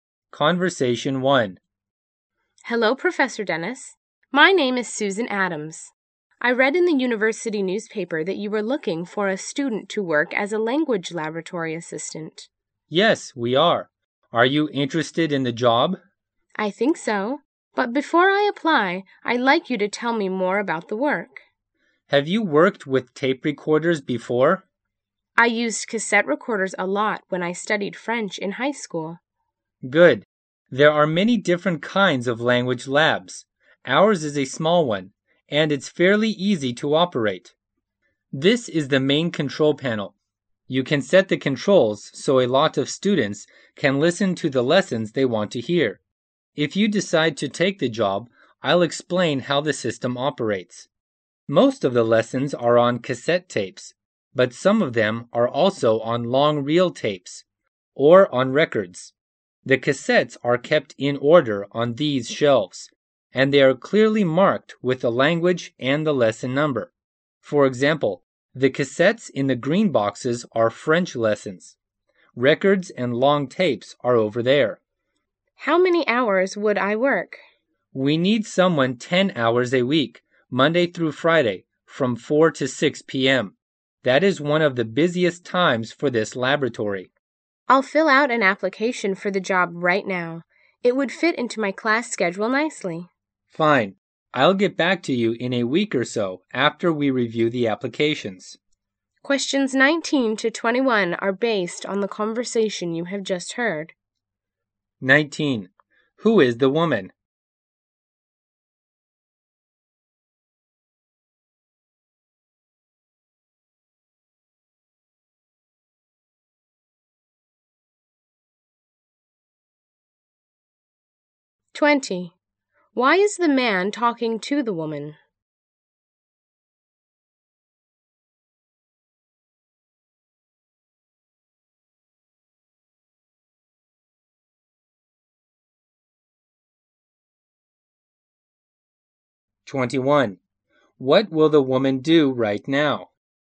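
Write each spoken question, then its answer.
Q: Who is the woman?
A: A student

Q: Why is the man talking to the woman?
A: She is interested in the language lab assistant job

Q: What will the woman do right now?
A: Fill out a job application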